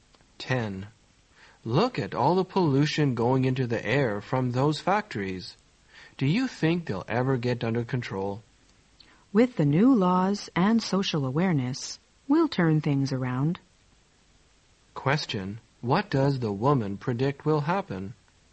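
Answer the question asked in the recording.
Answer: The pollution will be brought under control.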